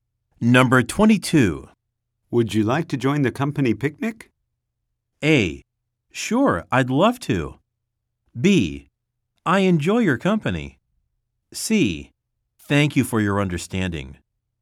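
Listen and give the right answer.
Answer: A: Sure, I'd love to.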